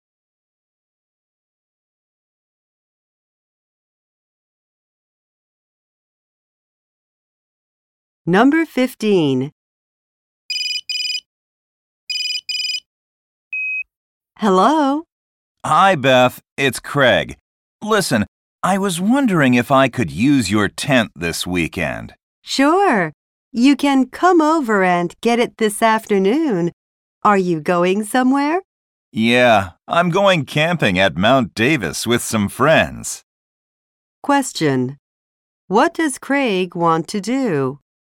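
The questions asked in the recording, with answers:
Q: What does Craig want to do?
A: Borrow Beth's tent.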